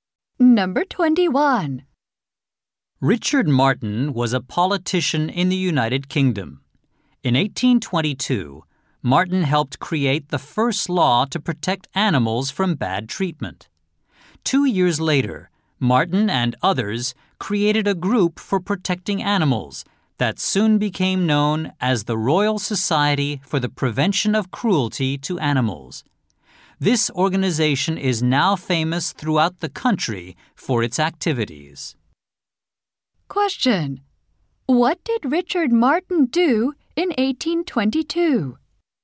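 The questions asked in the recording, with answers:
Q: What did Richard Martin do in 1822?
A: He helped create the first law protecting animals from bad treatment.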